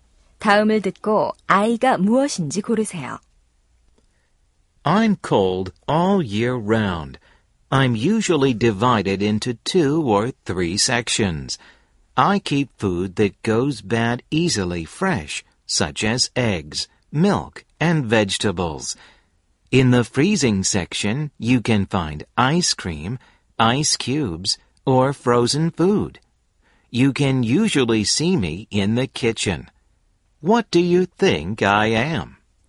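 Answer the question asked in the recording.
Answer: 냉장고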